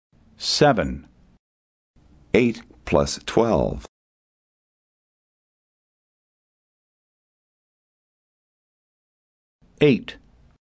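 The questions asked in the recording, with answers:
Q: 8 plus 12.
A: 20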